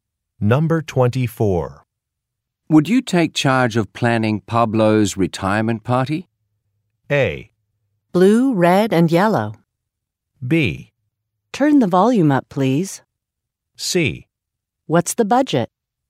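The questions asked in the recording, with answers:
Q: Would you take charge of planning Pablo's retirement party?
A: C: What's the budget?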